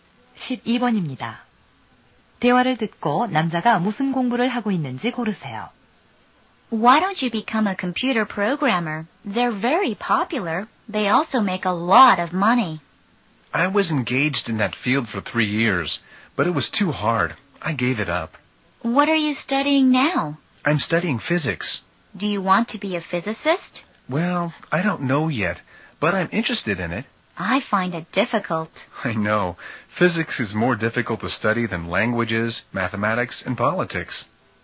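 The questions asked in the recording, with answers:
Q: 대화를 듣고 남자가 무슨 공부를 하고 있는지 고르세요.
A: 물리학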